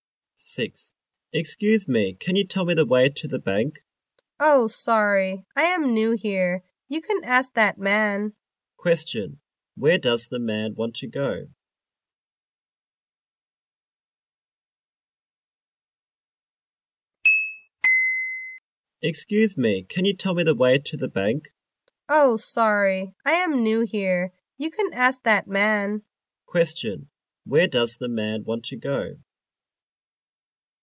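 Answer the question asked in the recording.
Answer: To the bank.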